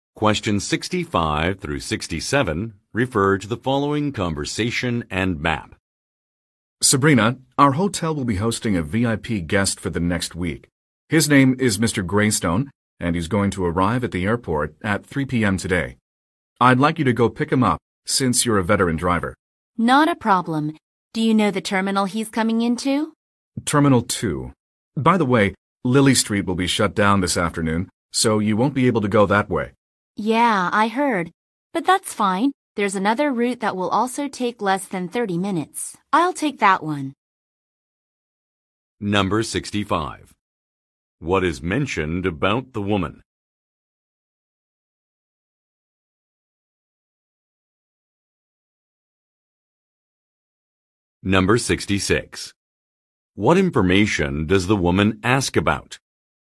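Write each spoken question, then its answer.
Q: What is mentioned about the woman?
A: She is a veteran driver.

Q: What information does the woman ask about?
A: The terminal Mr. Greystone is arriving at.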